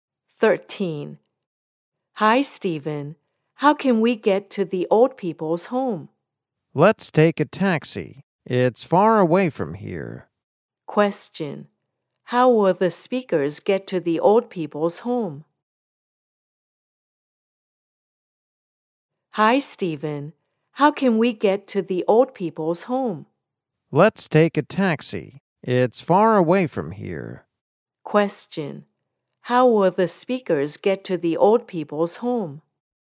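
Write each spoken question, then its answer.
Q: How will the speakers get to the old people's home?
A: By taxi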